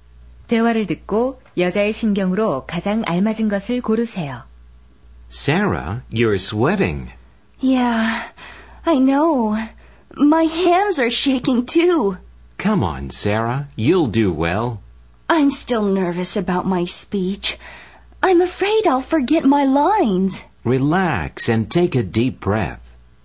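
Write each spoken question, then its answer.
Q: 대화를 듣고 여자의 심경으로 가장 알맞은 것을 고르세요.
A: 긴장됨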